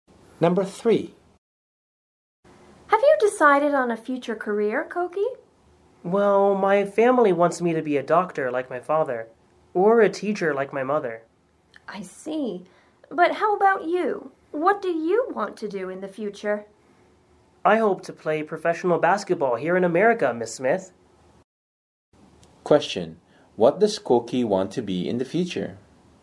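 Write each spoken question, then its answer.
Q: What does Koki want to be in the future?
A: A professional basketball player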